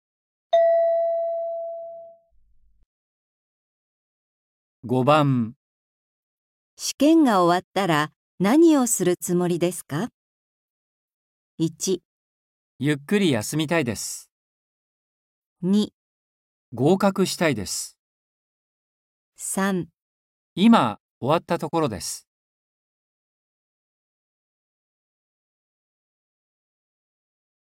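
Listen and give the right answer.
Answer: 1

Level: N4.36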